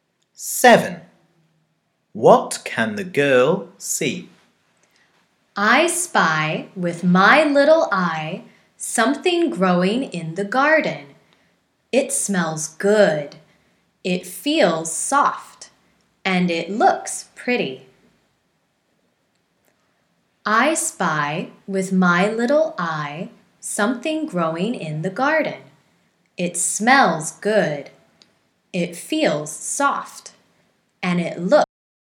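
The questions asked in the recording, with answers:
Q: What can the girl see?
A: a flower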